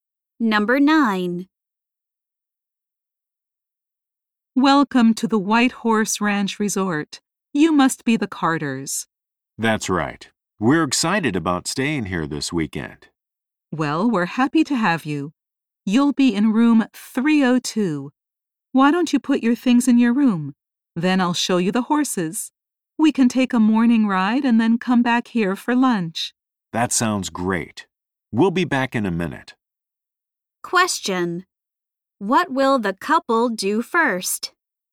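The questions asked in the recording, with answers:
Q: What will the couple do first?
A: Put their things in their room.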